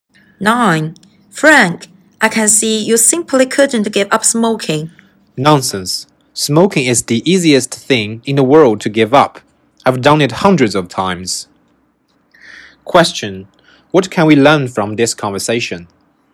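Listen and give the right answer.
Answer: Frank has tried to quit smoking many times but failed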